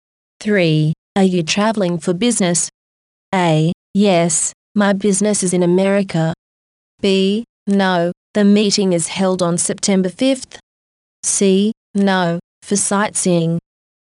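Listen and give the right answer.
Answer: C: No, for sightseeing.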